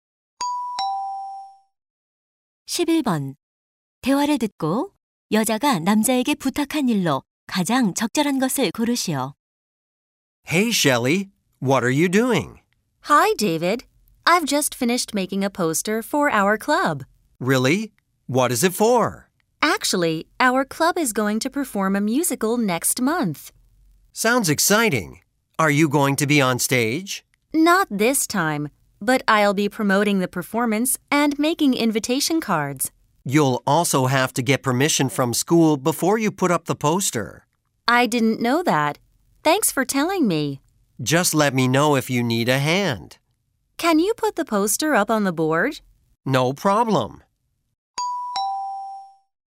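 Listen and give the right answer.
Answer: 게시판에 포스터 붙이기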